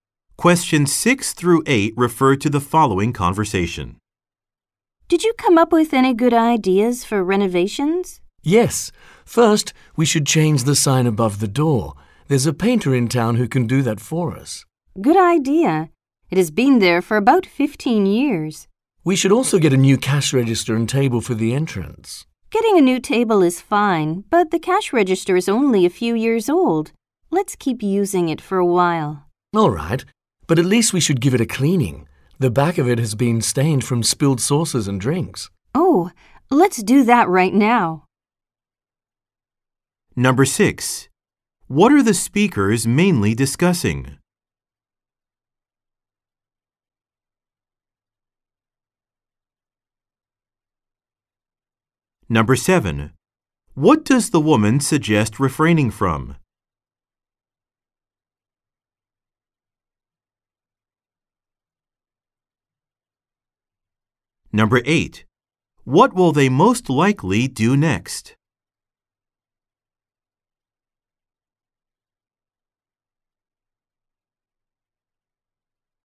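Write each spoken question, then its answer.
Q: What are the speakers mainly discussing?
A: Renovating their business

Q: What does the woman suggest refraining from?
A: Buying a new cash register

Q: What will they most likely do next?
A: Clean the cash register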